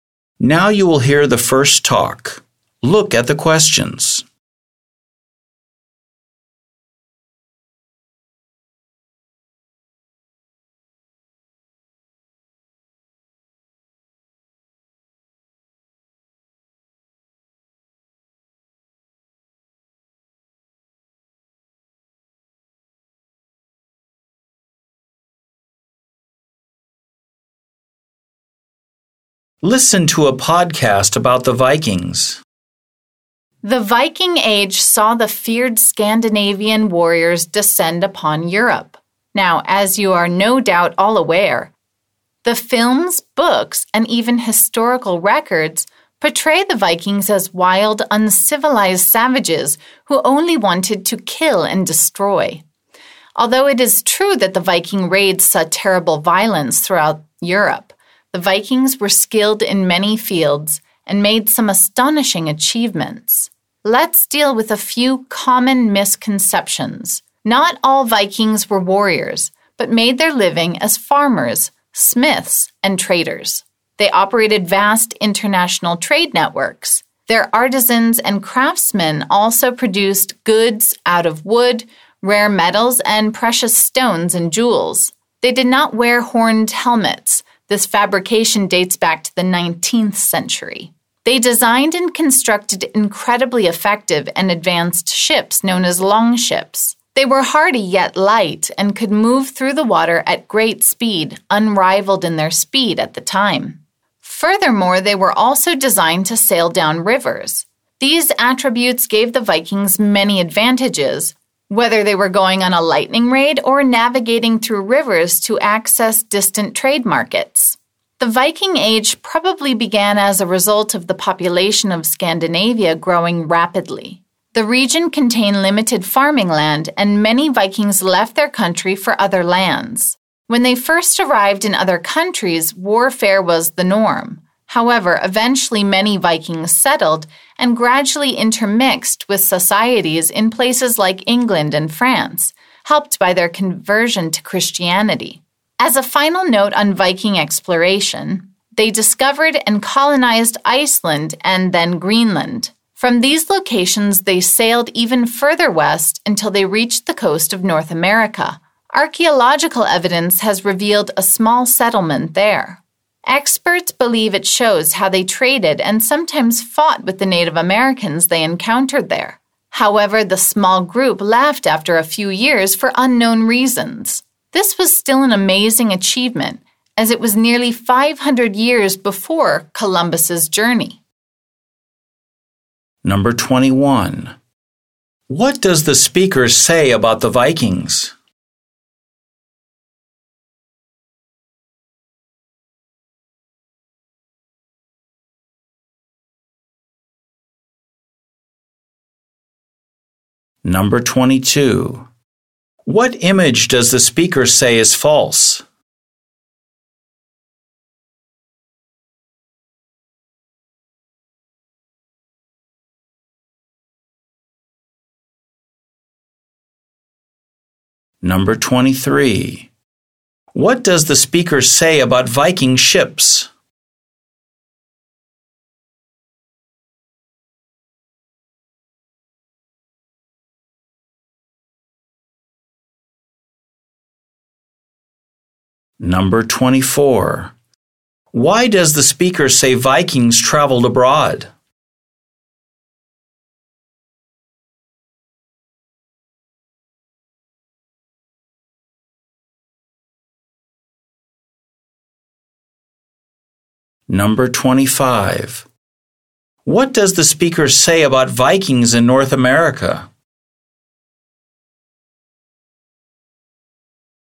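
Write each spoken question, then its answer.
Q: What image does the speaker say is false?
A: That Vikings wore horned helmets

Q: Why does the speaker say Vikings traveled abroad?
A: Scandinavia's population grew rapidly and there was limited farming land

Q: What does the speaker say about Vikings in North America?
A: They built a small settlement, traded and sometimes fought with Native Americans, and left after a few years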